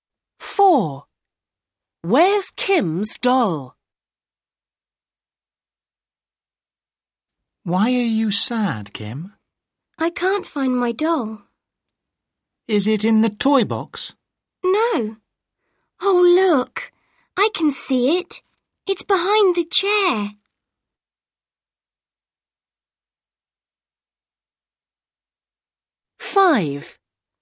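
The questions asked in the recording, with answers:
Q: Where's Kim's doll?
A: Behind the chair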